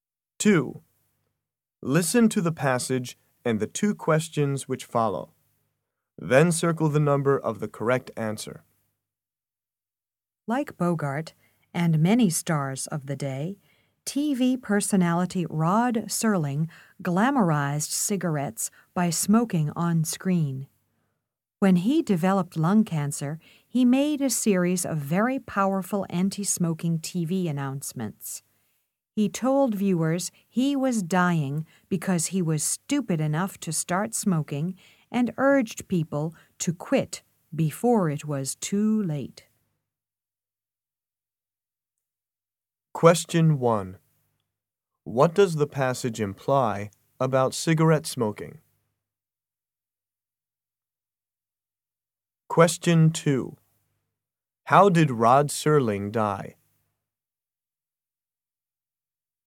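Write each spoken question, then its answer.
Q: How did Rod Serling die?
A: From lung cancer caused by smoking.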